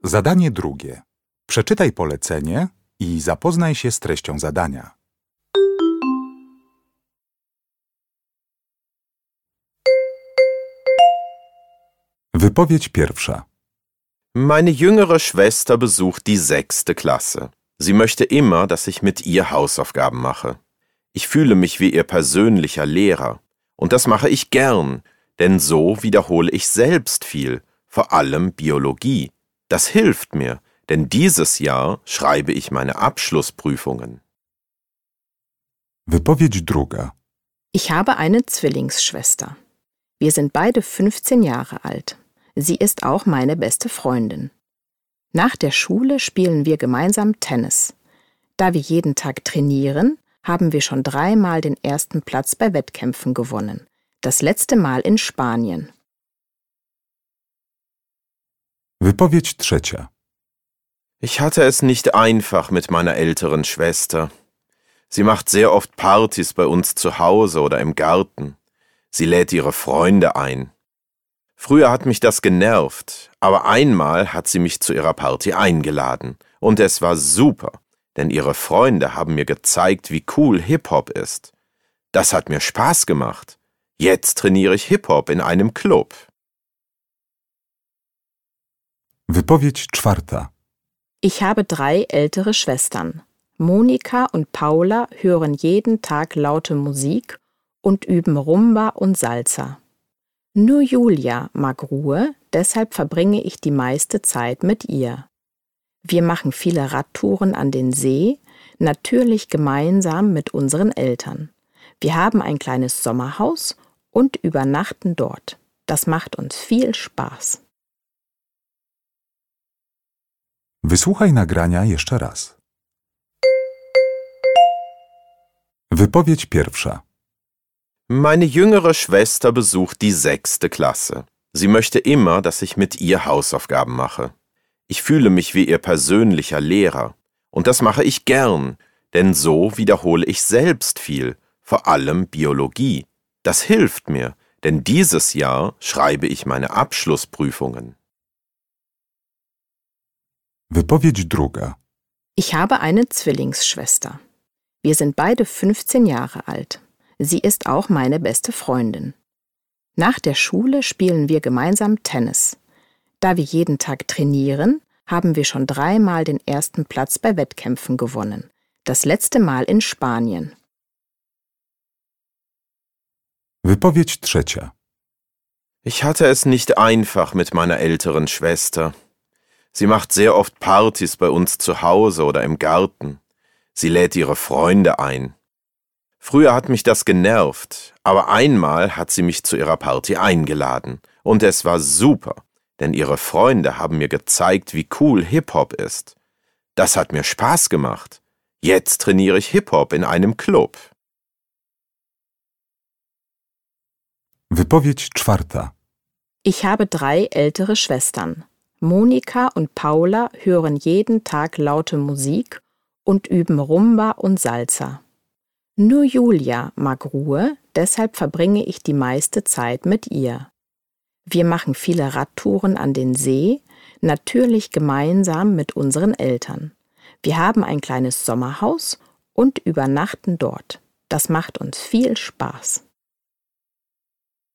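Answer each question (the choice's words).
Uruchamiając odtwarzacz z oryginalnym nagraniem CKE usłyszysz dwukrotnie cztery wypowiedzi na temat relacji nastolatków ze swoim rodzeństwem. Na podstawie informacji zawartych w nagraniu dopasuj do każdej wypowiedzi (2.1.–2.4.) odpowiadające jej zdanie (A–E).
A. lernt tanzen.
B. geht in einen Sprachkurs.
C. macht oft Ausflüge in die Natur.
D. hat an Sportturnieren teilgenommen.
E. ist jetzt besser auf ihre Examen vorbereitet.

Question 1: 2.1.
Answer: ist jetzt besser auf ihre Examen vorbereitet.

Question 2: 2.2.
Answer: hat an Sportturnieren teilgenommen.

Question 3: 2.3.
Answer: lernt tanzen.

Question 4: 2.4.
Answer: macht oft Ausflüge in die Natur.

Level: egzamin ósmoklasisty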